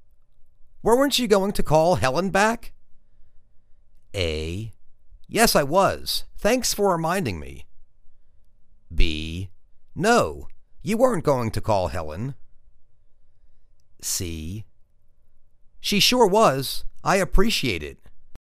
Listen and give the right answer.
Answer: Yes I was. Thanks for reminding me.